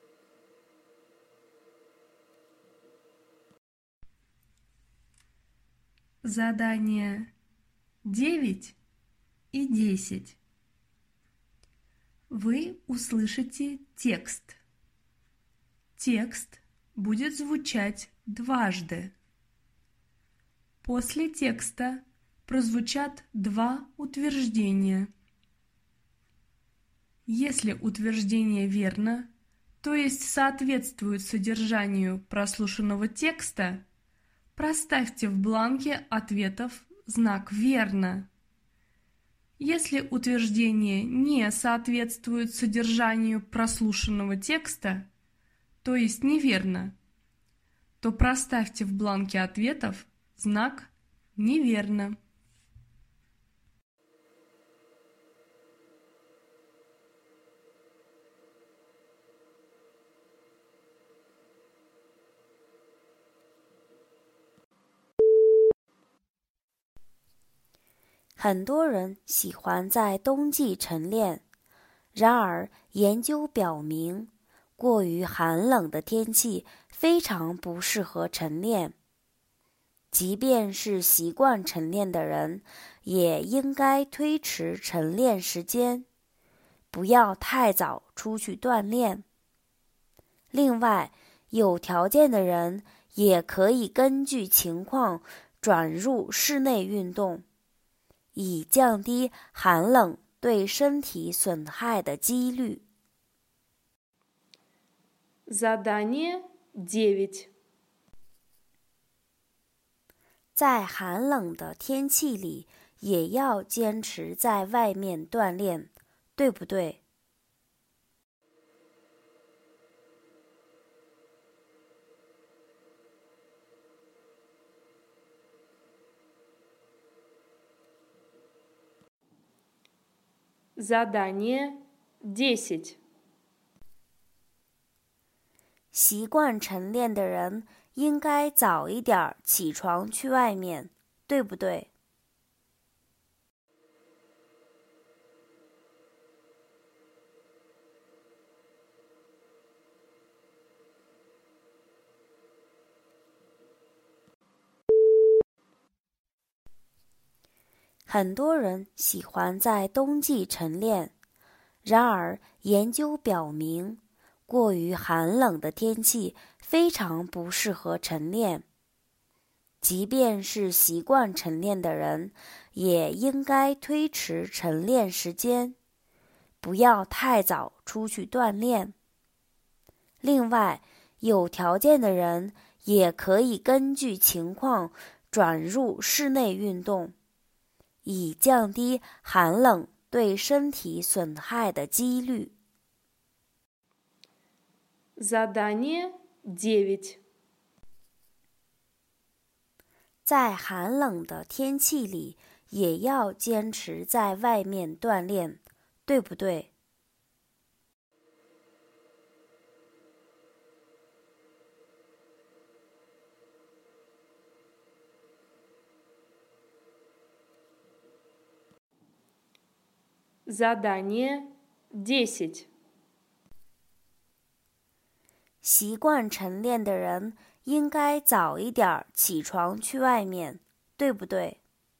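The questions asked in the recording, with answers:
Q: 在寒冷的天气里,也要坚持在外面锻炼,对不对?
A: 不对

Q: 习惯晨练的人应该早一点起床去外面,对不对?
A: 不对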